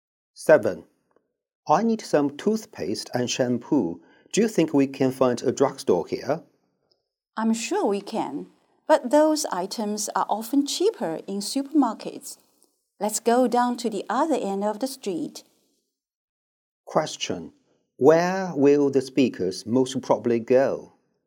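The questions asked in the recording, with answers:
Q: Where will the speakers most probably go?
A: To a supermarket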